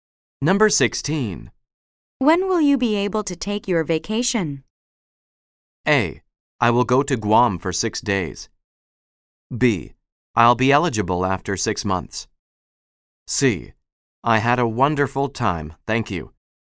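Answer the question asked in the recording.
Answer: B: I'll be eligible after 6 months.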